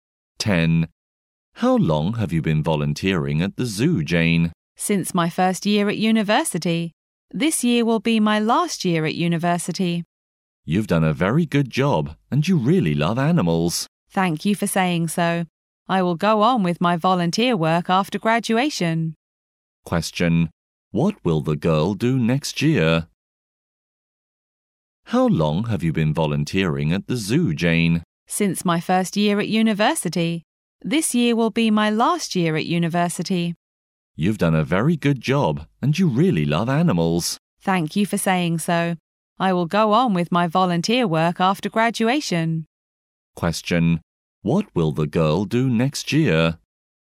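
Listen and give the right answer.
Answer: Go on volunteering at the zoo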